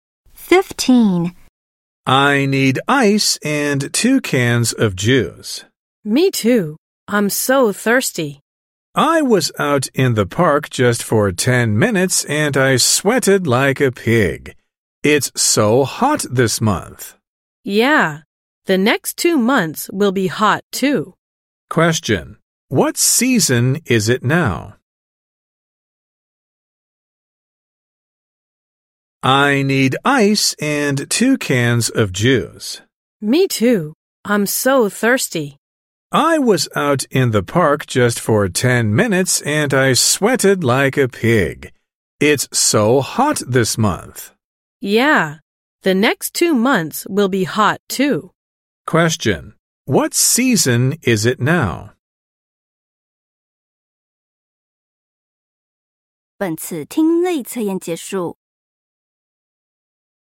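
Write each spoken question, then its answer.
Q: What season is it now?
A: Summer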